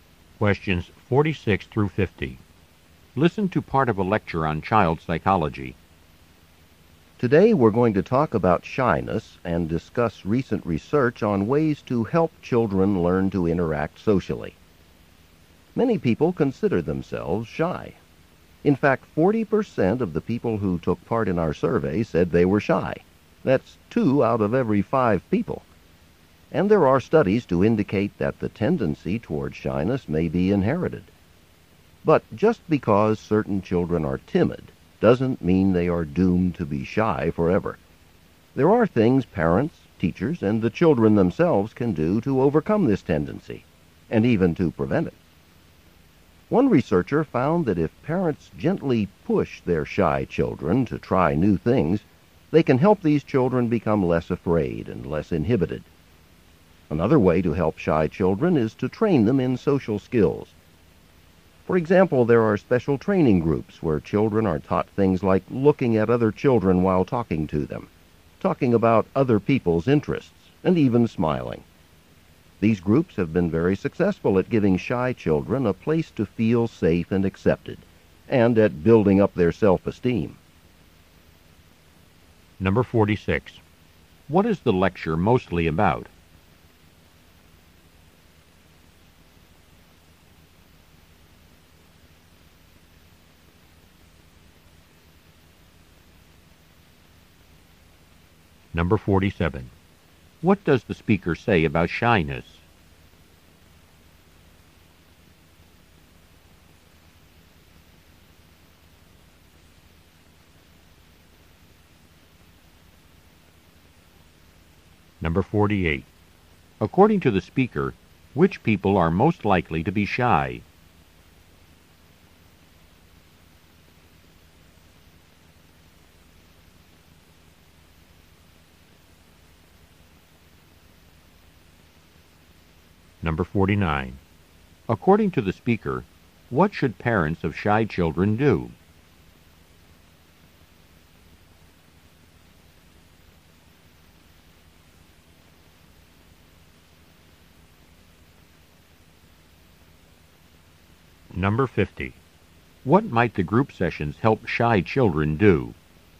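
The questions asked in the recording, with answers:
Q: What is the lecture mostly about?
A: Shyness in children and ways to help them overcome it

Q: According to the speaker, what should parents of shy children do?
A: Gently push them to try new things

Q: What might the group sessions help shy children do?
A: Learn social skills and build self-esteem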